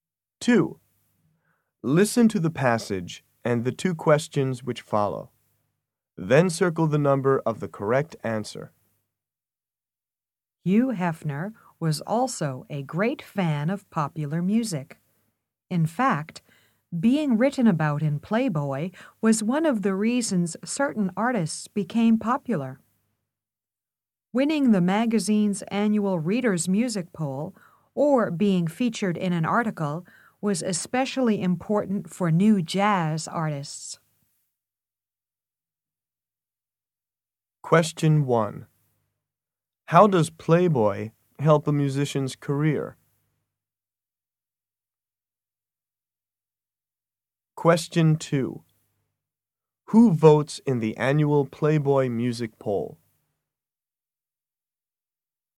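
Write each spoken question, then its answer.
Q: How does Playboy help a musician's career?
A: By writing about them, featuring them in articles or having them win its music poll, which makes them popular

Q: Who votes in the annual Playboy Music Poll?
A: The magazine's readers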